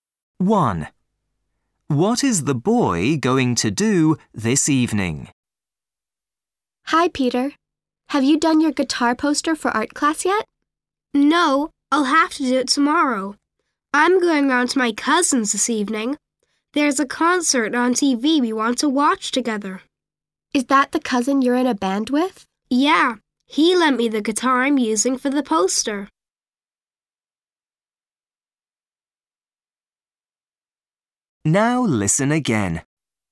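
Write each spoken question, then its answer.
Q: What is the boy going to do this evening?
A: watch a concert on TV at his cousin's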